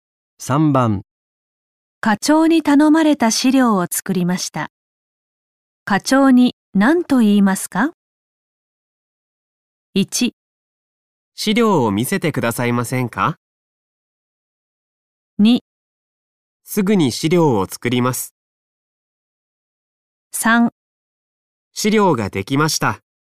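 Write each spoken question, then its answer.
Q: 課長に頼まれた資料を作りました。課長に何と言いますか?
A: 3: 資料ができました。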